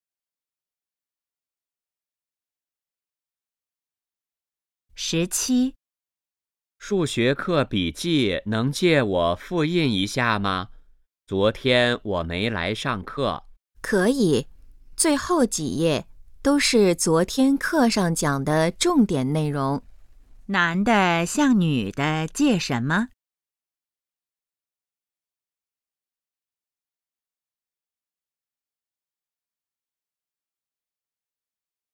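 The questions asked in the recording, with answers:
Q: 男的向女的借什么?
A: 数学课笔记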